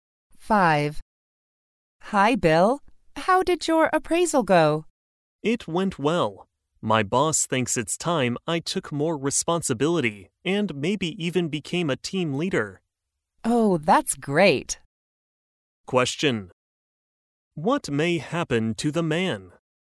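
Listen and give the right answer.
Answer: He may become a team leader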